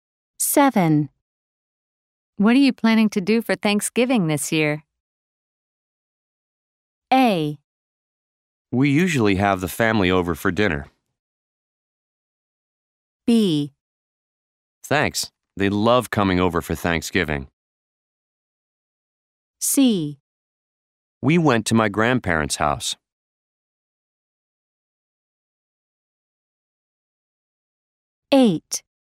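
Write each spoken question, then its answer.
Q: What are you planning to do for Thanksgiving this year?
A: A: We usually have the family over for dinner.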